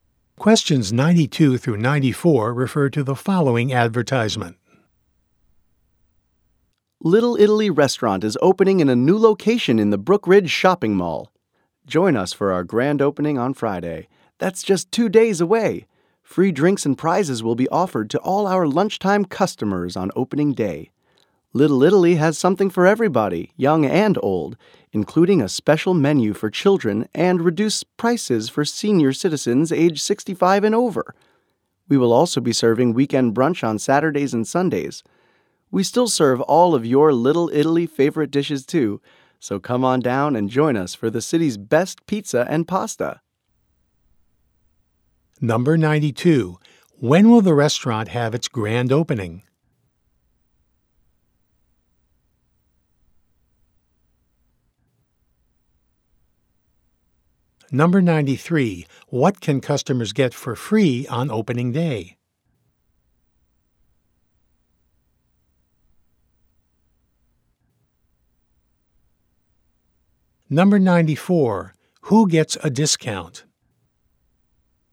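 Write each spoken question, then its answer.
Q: When will the restaurant have its grand opening?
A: Friday

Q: What can customers get for free on opening day?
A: Drinks (and prizes)

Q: Who gets a discount?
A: Senior citizens aged 65 and over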